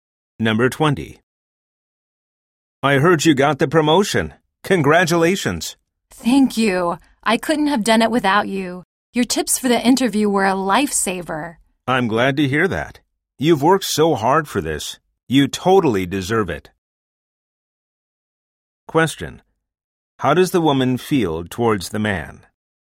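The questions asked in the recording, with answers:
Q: How does the woman feel towards the man?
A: Grateful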